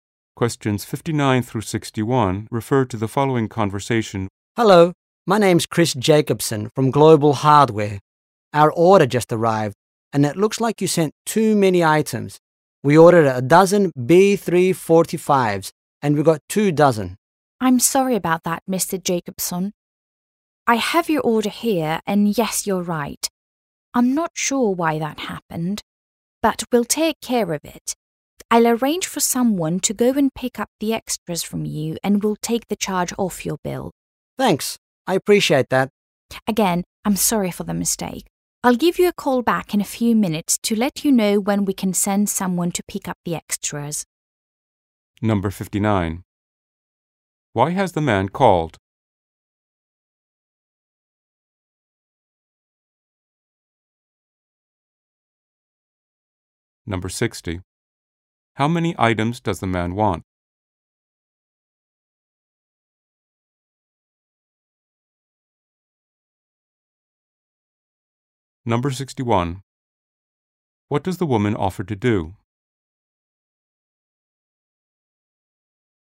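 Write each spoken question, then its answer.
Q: Why has the man called?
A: He was sent too many items.

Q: How many items does the man want?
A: A dozen

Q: What does the woman offer to do?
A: Have the extras picked up and remove the charge from the bill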